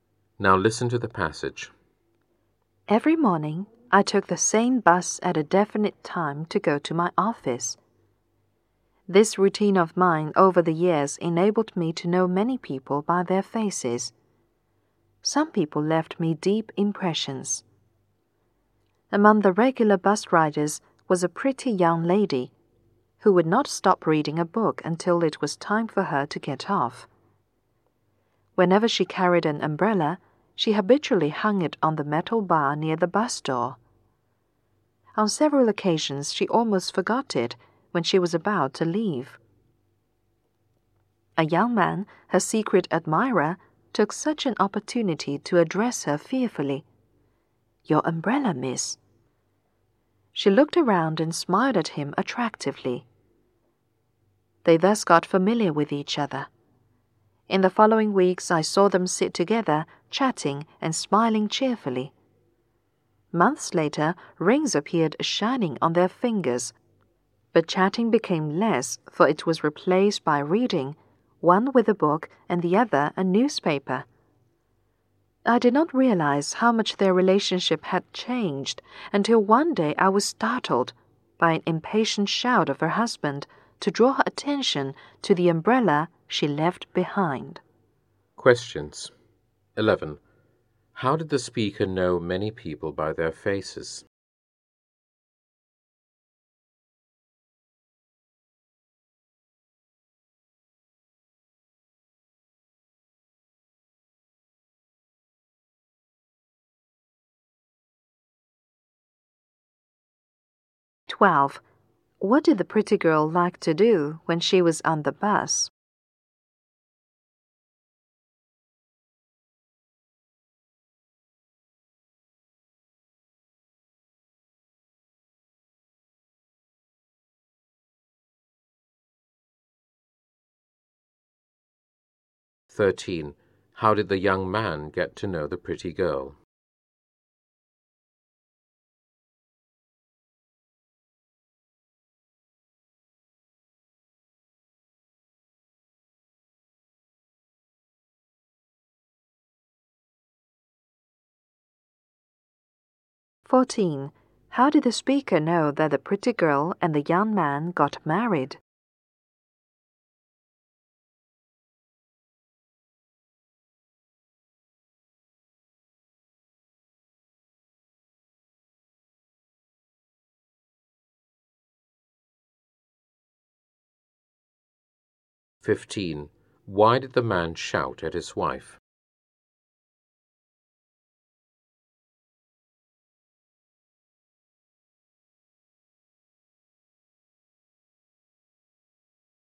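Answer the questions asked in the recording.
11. By taking the same bus every morning for years
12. Reading a book
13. By reminding her of her umbrella
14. Rings appeared on their fingers
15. She left her umbrella behind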